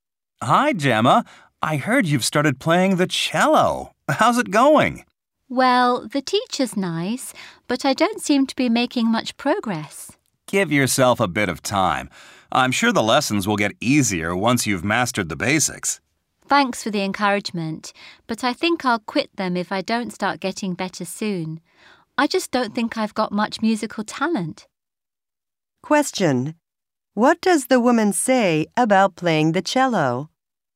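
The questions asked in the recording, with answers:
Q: What does the woman say about playing the cello?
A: She isn't making much progress and may quit because she thinks she has little musical talent.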